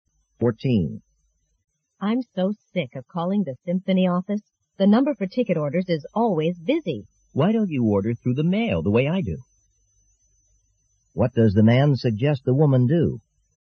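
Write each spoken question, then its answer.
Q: What does the man suggest the woman do?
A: Order tickets by mail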